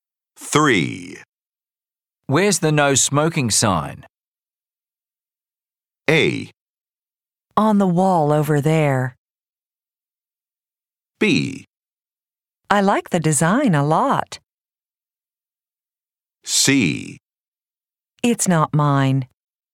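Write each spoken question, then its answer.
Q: Where's the no smoking sign?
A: A: On the wall over there.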